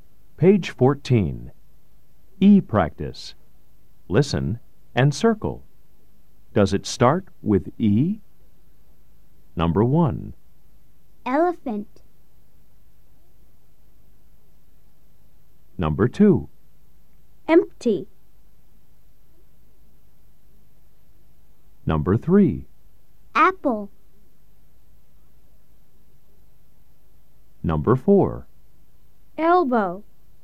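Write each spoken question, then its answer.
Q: Does it start with E? Number 1. Elephant.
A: Yes

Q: Empty.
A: Yes

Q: Apple.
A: No

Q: Elbow.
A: Yes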